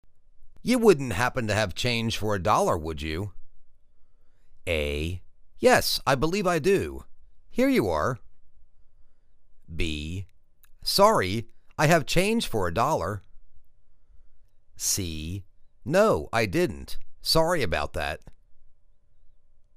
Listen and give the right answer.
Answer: Yes, I believe I do. Here you are.